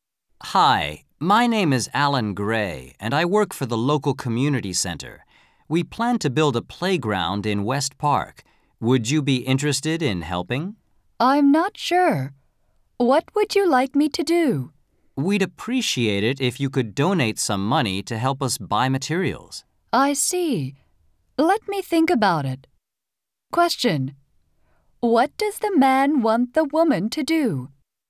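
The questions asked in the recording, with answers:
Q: What does the man want the woman to do?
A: Donate money to help buy materials for a playground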